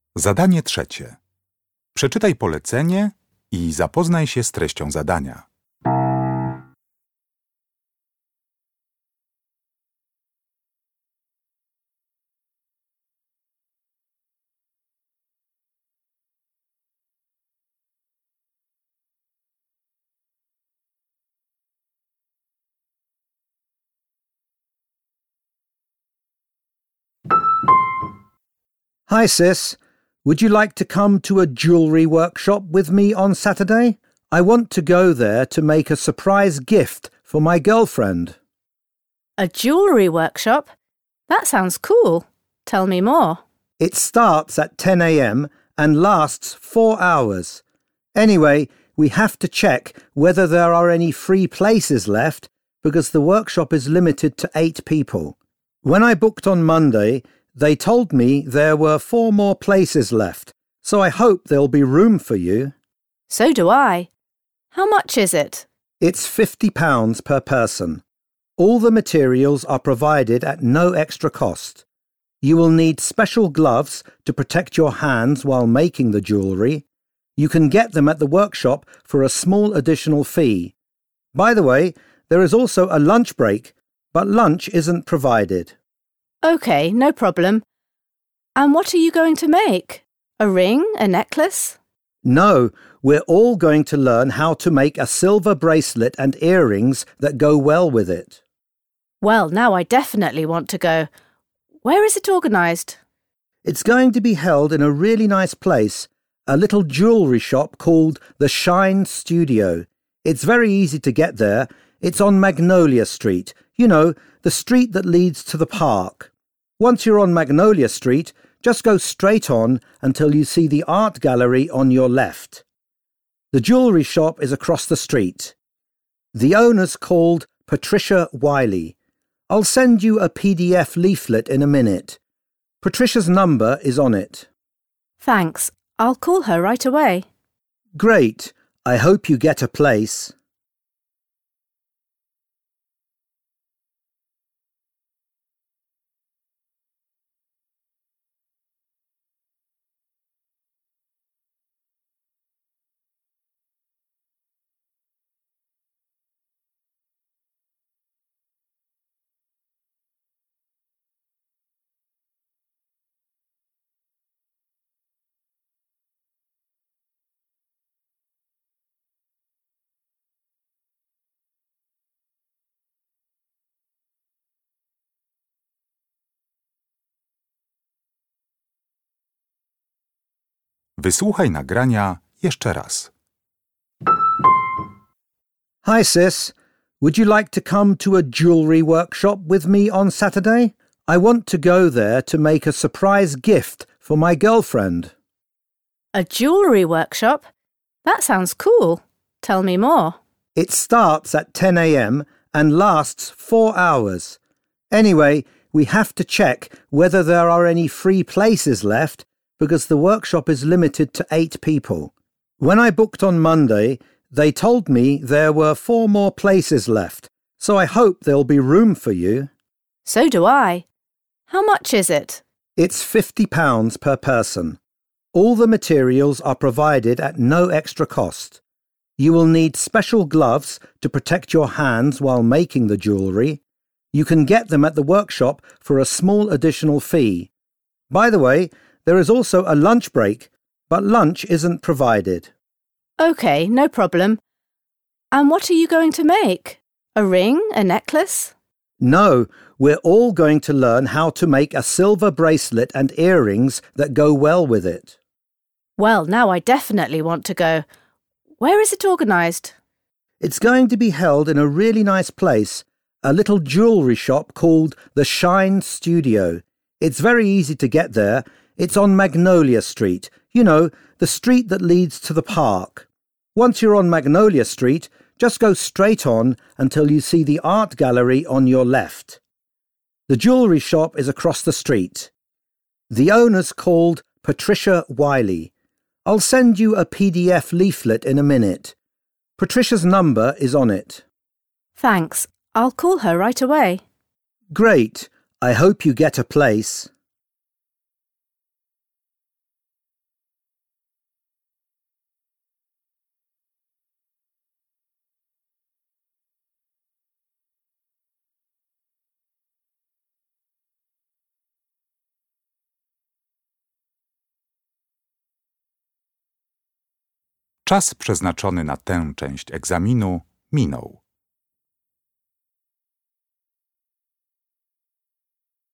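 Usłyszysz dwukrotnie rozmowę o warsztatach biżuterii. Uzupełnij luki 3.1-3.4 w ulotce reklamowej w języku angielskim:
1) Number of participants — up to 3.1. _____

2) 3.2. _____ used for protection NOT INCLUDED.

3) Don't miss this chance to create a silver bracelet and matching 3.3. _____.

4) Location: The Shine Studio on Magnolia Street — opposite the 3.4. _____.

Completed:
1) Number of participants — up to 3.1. 8
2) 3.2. Gloves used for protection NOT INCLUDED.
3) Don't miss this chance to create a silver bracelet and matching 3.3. earrings.
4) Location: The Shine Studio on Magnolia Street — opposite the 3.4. art gallery.

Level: poziom podstawowy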